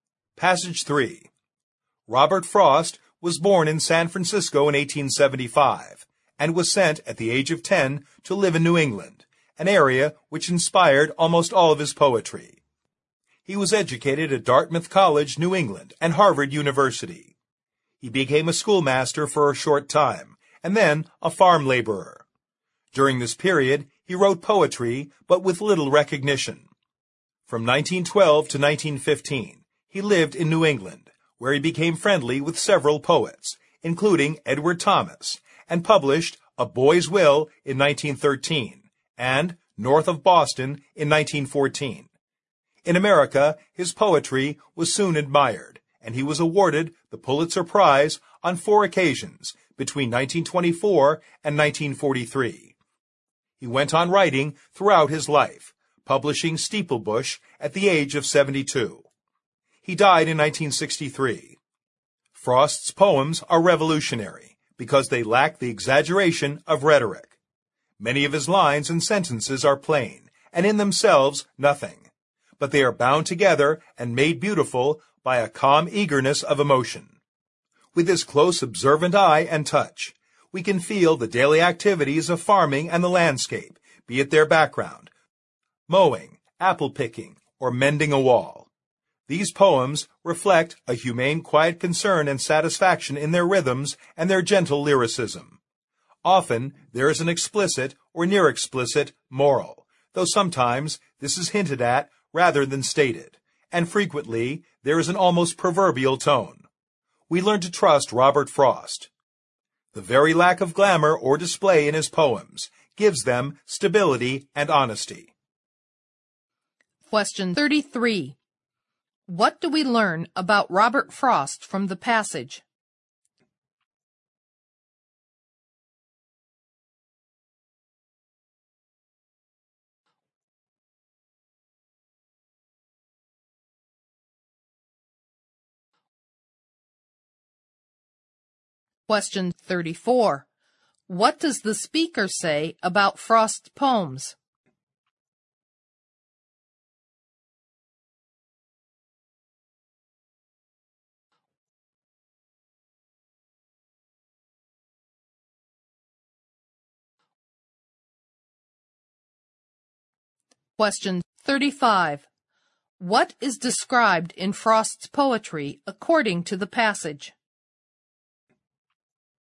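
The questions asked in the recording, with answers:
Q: What is described in Frost's poetry according to the passage?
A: Daily farming activities and the landscape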